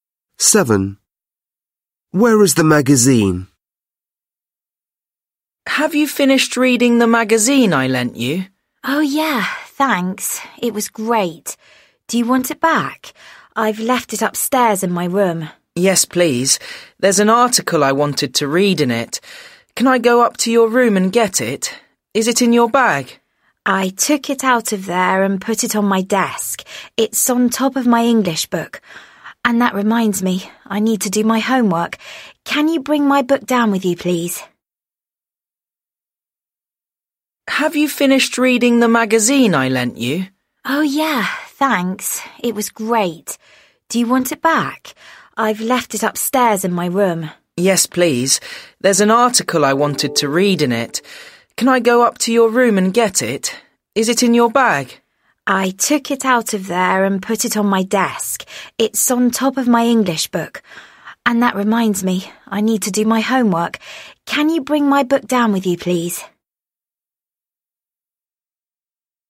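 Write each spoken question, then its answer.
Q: Where is the magazine?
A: on the desk, on top of the English book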